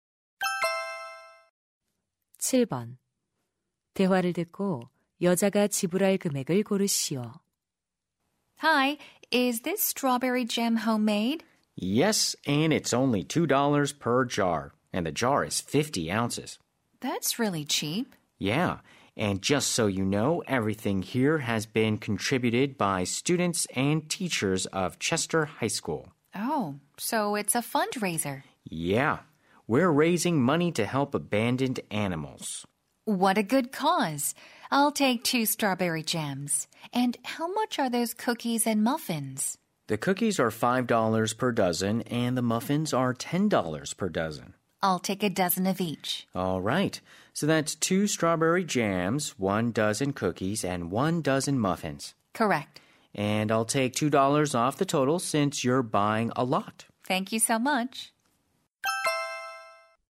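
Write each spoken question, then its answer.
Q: 대화를 듣고 여자가 지불할 금액을 고르시오.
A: $17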